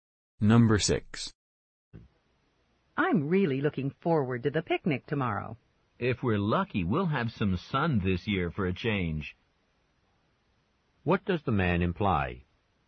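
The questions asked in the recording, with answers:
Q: What does the man imply?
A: The weather was bad for the picnic in past years.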